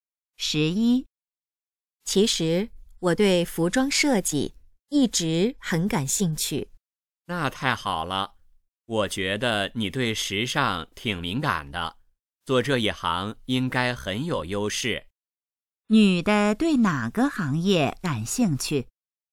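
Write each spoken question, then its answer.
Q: 女的对哪个行业感兴趣?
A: 服装设计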